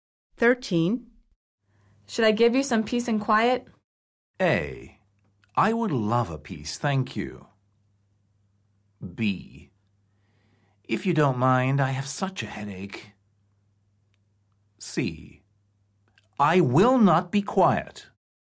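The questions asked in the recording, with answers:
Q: Should I give you some peace and quiet?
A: B: If you don't mind, I have such a headache.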